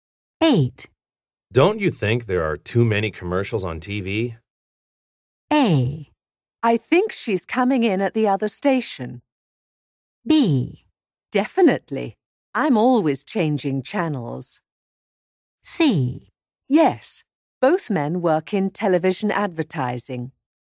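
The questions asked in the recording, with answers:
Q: Don't you think there are too many commercials on TV?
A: B: Definitely. I'm always changing channels.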